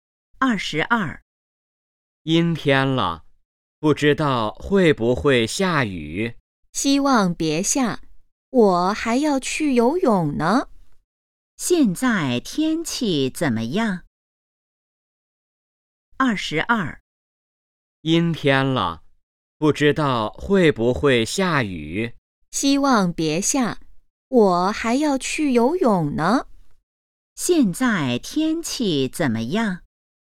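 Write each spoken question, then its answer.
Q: 现在天气怎么样?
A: 阴天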